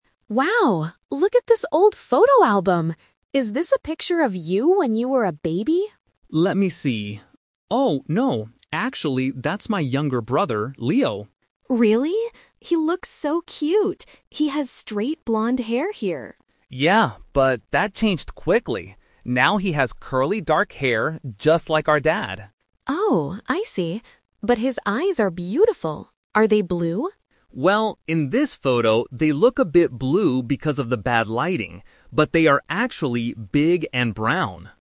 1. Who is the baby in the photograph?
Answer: Tom's brother.

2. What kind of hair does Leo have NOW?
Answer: Curly dark hair.

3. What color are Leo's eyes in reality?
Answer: Brown.

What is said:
Lisa: Wow, look at this old photo album! Is this a picture of you when you were a baby?
Tom: Let me see... Oh, no, actually that's my younger brother, Leo.
Lisa: Really? He looks so cute! He has straight blonde hair here.
Tom: Yeah, but that changed quickly. Now he has curly dark hair, just like our dad.
Lisa: Oh, I see. But his eyes are beautiful. Are they blue?
Tom: Well, in this photo they look a bit blue because of the bad lighting, but they are actually big and brown.